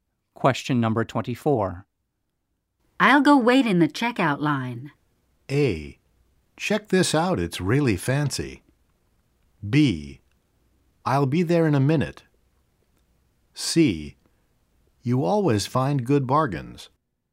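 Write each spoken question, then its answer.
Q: I'll go wait in the checkout line.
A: B: I'll be there in a minute.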